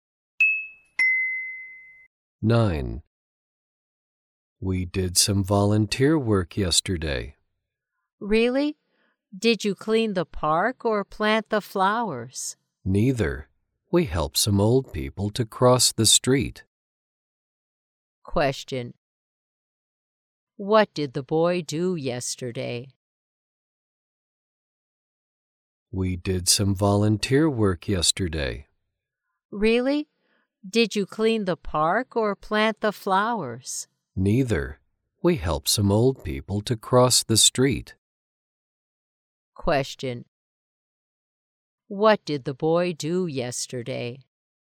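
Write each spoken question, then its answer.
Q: What did the boy do yesterday?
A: He helped some old people to cross the street.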